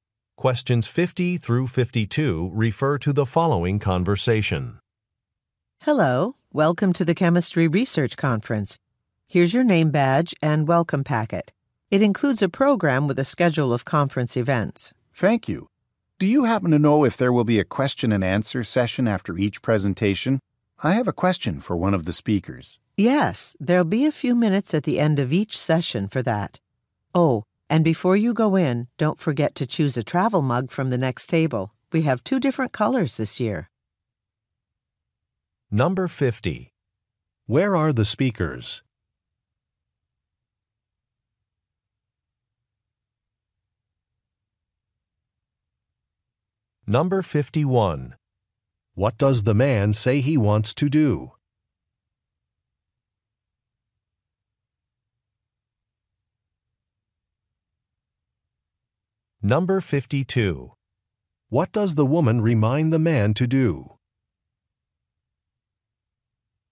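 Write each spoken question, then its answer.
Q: Where are the speakers?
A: At a chemistry research conference

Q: What does the man say he wants to do?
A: Ask a speaker a question

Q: What does the woman remind the man to do?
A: Choose a travel mug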